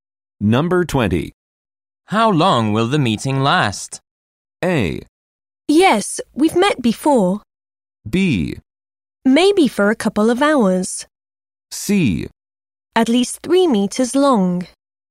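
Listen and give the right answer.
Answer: B: Maybe for a couple of hours.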